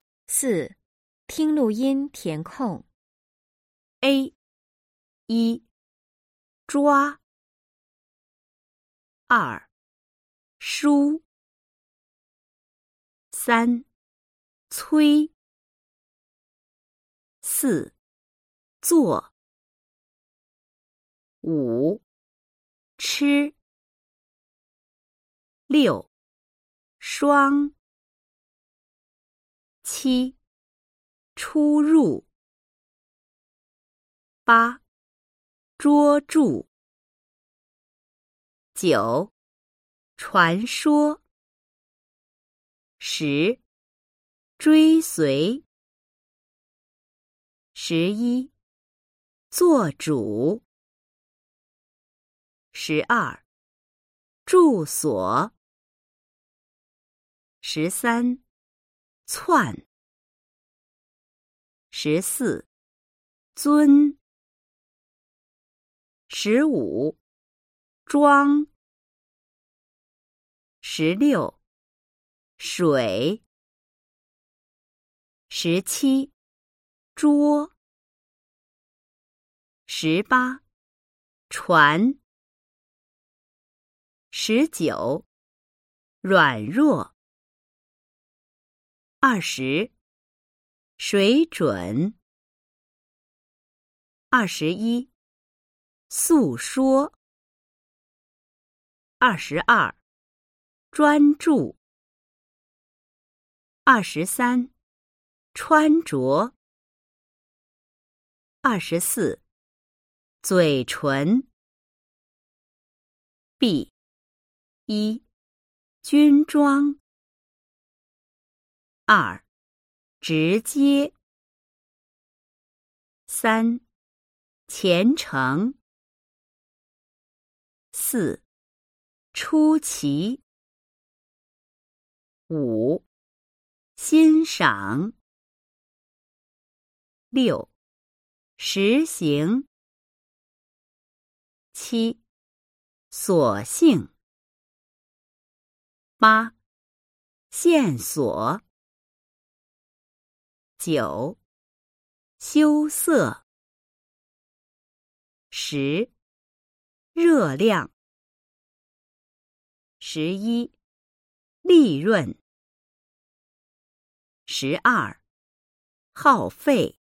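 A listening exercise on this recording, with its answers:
4. 听录音填空- Nghe điền vào chỗ trống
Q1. ___uā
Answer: zh

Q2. ___uī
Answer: c

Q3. ____uò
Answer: z

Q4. ____uāng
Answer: sh

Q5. ____ū____ù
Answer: ch, r

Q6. ____uó___ ù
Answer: zh, zh

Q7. ____uán ____uō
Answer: ch, sh

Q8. ________uí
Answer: zhuīs

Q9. ____uò ____ǔ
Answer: z, zh

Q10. ____ù___ uǒ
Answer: zh, s

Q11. sh____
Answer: uǐ

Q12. ch____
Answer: uán

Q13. r____r____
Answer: uǎn, uò

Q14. sh____zh____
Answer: uǐ, ǔn

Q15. s____sh____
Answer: ù, uō

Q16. zh____zh____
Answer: uān, ù

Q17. ch___zh____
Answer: uān, uó

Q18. z____ch____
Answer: uǐ, ún

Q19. ____ūn____ūang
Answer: j, zh

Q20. ____í ___ iē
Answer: zh, j

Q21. ____ián ____éng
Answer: q, ch

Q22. ____ū____í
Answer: ch, q

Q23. ____īn ____ǎng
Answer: x, sh

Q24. ____í___ íng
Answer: sh, x

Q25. ____uǒ____ìng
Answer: s, x

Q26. ____iàn ___uǒ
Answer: x, s

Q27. ____iū ____è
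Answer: x, s

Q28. ____è___ iàng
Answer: r, l

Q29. ____ì ____ùn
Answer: l, r

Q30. ____ào ___èi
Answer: h, f

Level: Sơ Cấp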